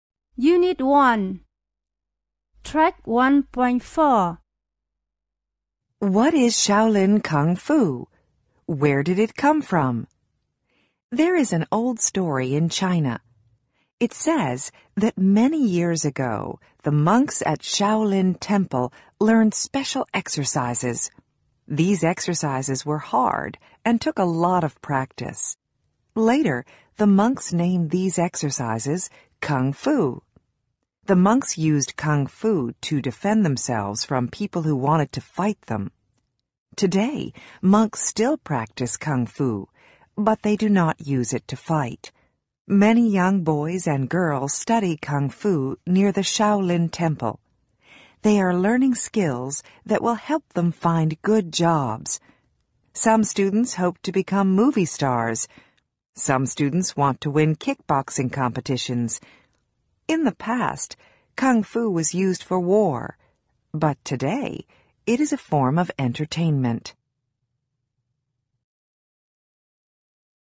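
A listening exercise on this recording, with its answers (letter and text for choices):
Listen to the following talk and decide which its main idea is.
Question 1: Listen to the following talk and decide which its main idea is.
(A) Kung fu in China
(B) ShaolinTemple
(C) The Origins of Shaolin kung fu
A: (C) The Origins of Shaolin kung fu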